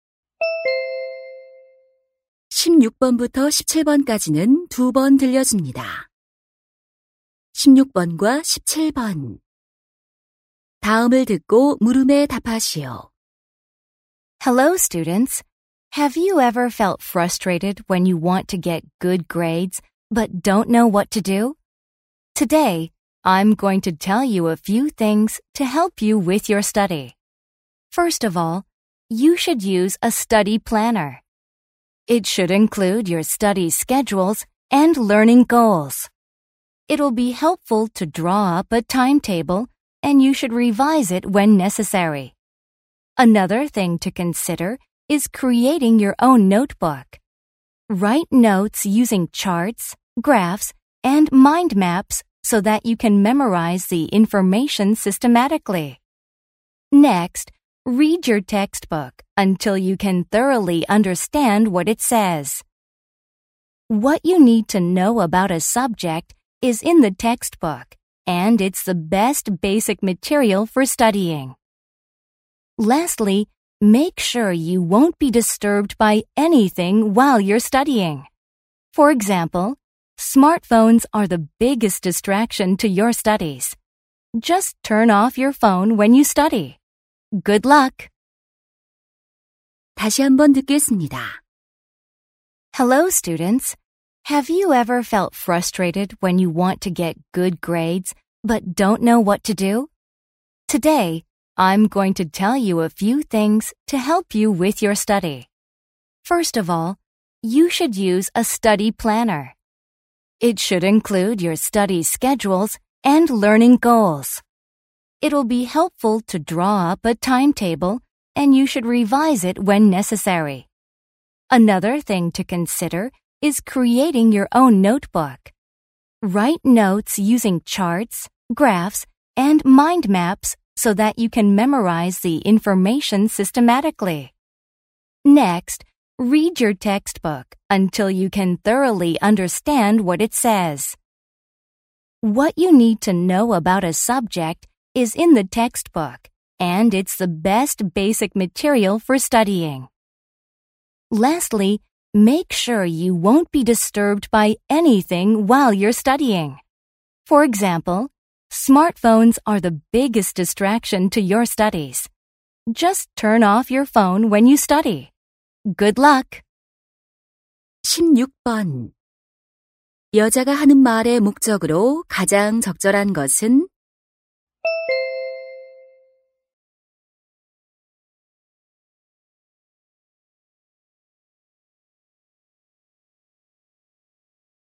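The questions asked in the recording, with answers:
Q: 여자가 하는 말의 목적으로 가장 적절한 것은?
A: 성적을 올리는 공부 방법을 조언하려고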